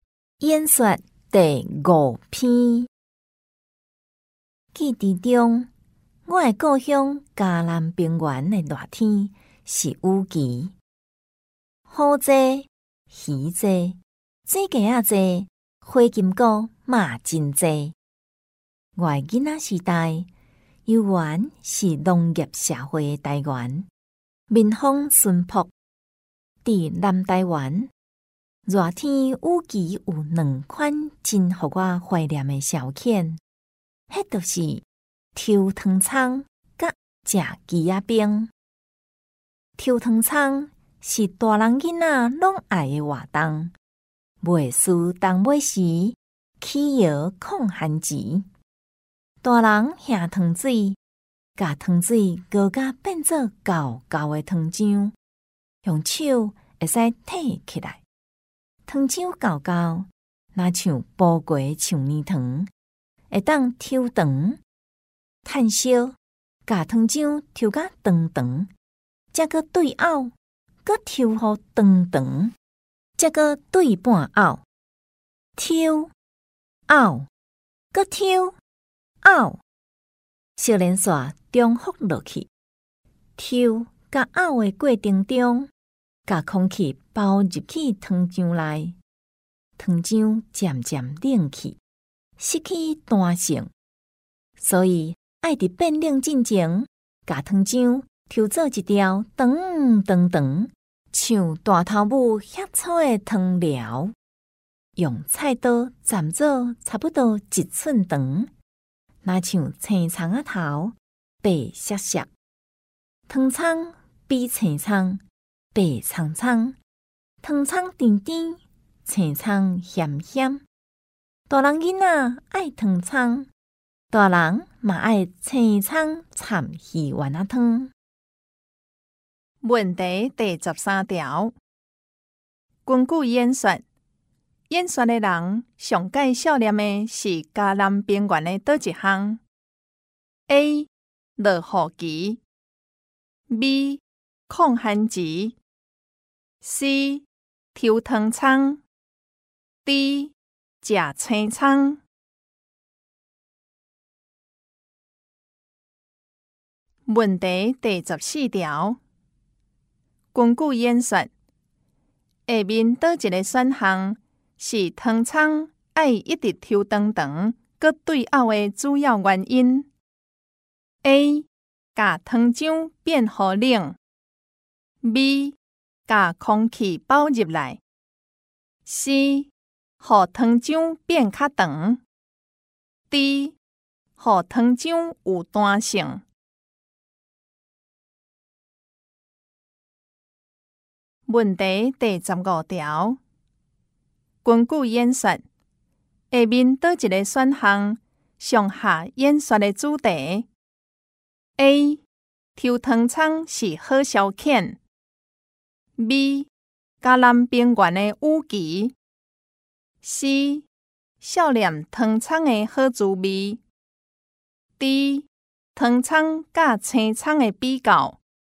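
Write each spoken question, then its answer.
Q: 根据演说,下面哪一个选项?是汤葱爱一直抽长长,搁对后的主要原因。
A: B: 把空气包入来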